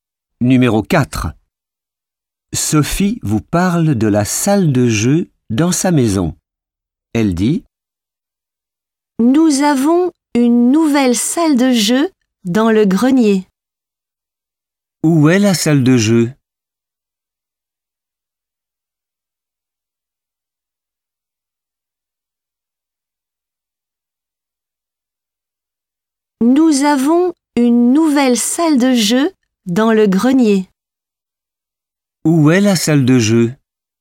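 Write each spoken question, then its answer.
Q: Où est la salle de jeu?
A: dans le grenier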